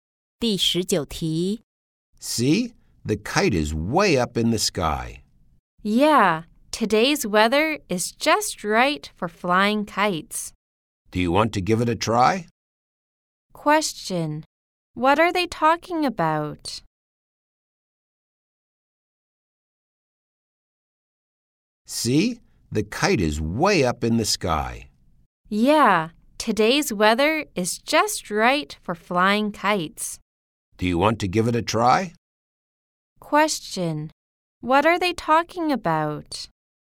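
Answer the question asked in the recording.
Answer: Flying kites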